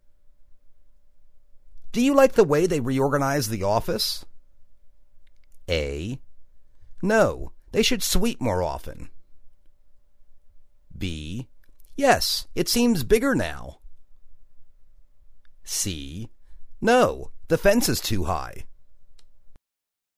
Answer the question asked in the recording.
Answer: Yes, it seems bigger now.